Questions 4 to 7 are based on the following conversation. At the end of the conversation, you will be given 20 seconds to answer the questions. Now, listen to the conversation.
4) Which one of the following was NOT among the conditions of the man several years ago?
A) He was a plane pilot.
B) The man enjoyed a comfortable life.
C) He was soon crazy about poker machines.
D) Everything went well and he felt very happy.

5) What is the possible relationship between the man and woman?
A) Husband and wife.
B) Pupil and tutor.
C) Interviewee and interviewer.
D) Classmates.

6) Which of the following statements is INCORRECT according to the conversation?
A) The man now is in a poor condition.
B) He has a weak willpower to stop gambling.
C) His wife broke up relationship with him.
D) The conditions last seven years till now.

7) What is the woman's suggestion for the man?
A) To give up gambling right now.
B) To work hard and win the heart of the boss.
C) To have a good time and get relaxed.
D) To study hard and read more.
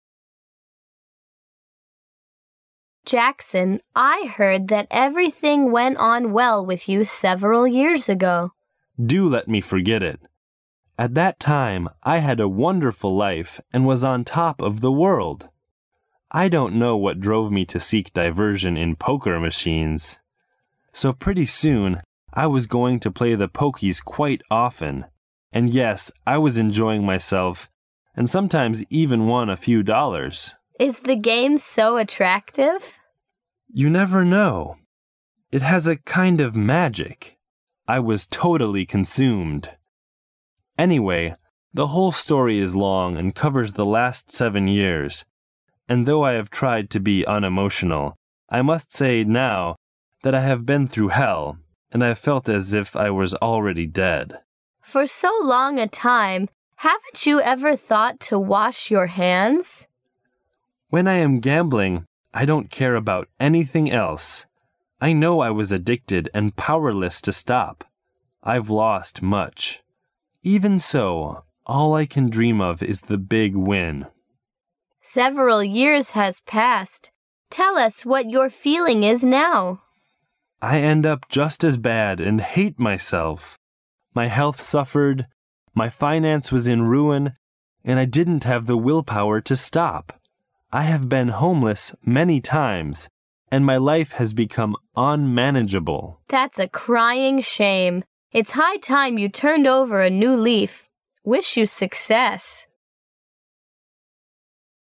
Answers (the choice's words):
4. He was a plane pilot.
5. Interviewee and interviewer.
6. His wife broke up relationship with him.
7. To give up gambling right now.

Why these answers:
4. W: Jackson, I heard that everything went on well with you several years ago. M: Do let me forget it. (4) At that time I had a wonderful life and was on top of the world. I don't know what drove me to seek diversion in poker machines. So pretty soon I was going to play the pokies quite often and yes I was enjoying myself and sometimes even won a few dollars. W: Is the game so attractive? M: You never know. It has a kind of magic. I was totally consumed. Anyway the whole story is long and covers the last seven years and though I have tried to be unemotional. I must say now that I have been through hell and I've felt as if I was already dead. W: For so long a time, haven't you ever thought to wash your hands? M: When I am gambling, I don't care about anything else. I know I was addicted and powerless to stop. I've lost much. Even so all I can dream of is the big win. W: Several years has passed, tell us what your feeling is now? M: (6) I end up just as bad, and hate myself. My health suffered, my finance was in ruin, and I didn't have the willpower to stop. I have been homeless many times and my life has become unmanageable. W: (7) That's a crying shame. It's high time you turned over a new leaf. Wish you success.

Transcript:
A B C D A [解析] 4-7 W: Jackson, I heard that everything went on well with you several years ago. M: Do let me forget it. (4) At that time I had a wonderful life and was on top of the world. I don't know what drove me to seek diversion in poker machines. So pretty soon I was going to play the pokies quite often and yes I was enjoying myself and sometimes even won a few dollars. W: Is the game so attractive? M: You never know. It has a kind of magic. I was totally consumed. Anyway the whole story is long and covers the last seven years and though I have tried to be unemotional. I must say now that I have been through hell and I've felt as if I was already dead. W: For so long a time, haven't you ever thought to wash your hands? M: When I am gambling, I don't care about anything else. I know I was addicted and powerless to stop. I've lost much. Even so all I can dream of is the big win. W: Several years has passed, tell us what your feeling is now? M: (6) I end up just as bad, and hate myself. My health suffered, my finance was in ruin, and I didn't have the willpower to stop. I have been homeless many times and my life has become unmanageable. W: (7) That's a crying shame. It's high time you turned over a new leaf. Wish you success.

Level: 专业四级